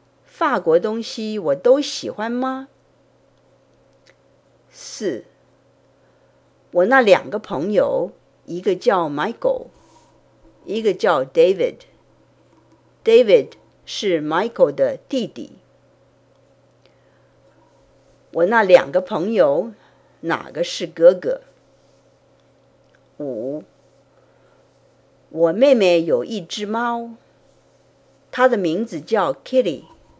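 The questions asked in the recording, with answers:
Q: 我那两个朋友哪个是哥哥?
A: Michael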